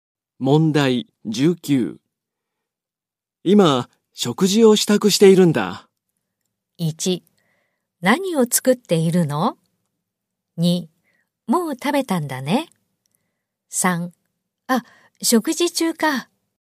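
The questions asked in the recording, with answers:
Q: 今、食事を支度しているんだ。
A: 1: 何を作っているの?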